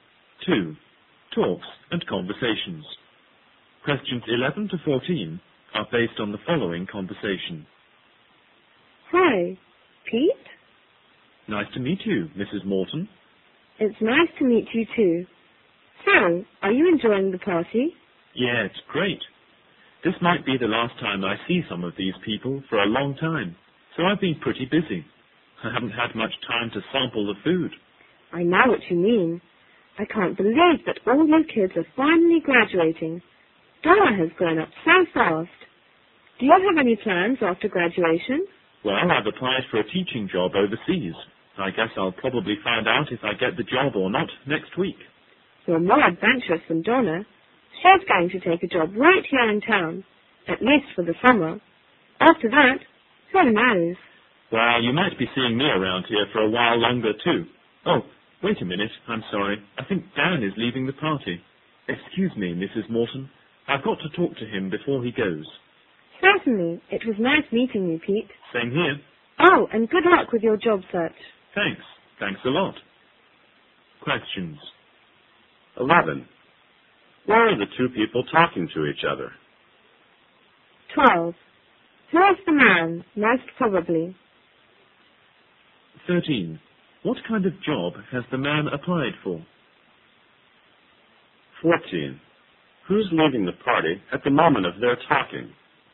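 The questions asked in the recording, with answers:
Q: What kind of job has the man applied for?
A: A teaching job overseas

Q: Who's leaving the party at the moment of their talking?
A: Dan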